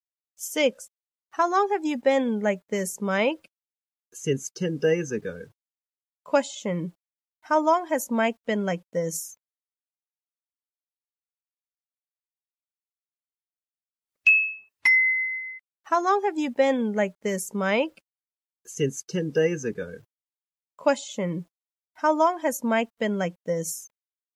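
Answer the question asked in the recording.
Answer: Since 10 days ago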